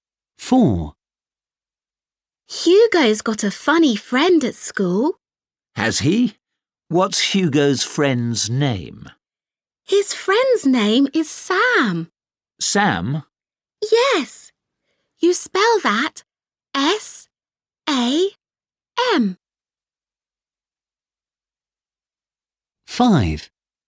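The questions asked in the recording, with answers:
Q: What's Hugo's friend's name?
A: Sam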